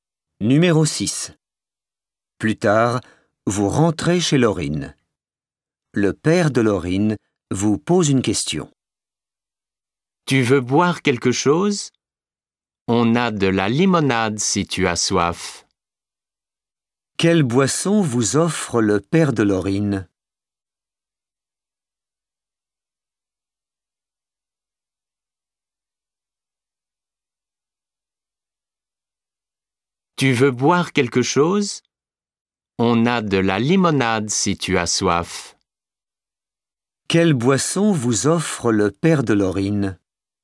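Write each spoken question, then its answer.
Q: Quelle boisson vous offre le père de Laurine?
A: de la limonade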